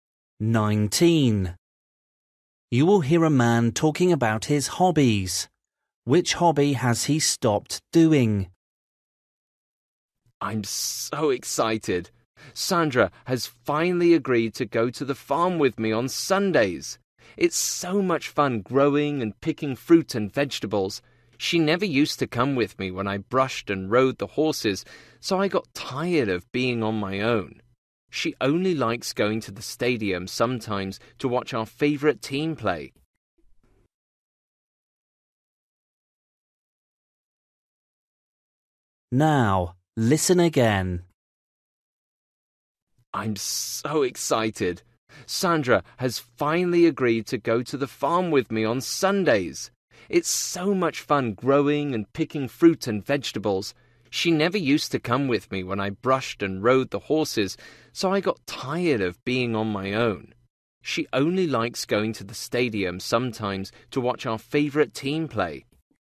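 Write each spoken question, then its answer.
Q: Which hobby has he stopped doing?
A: Horse riding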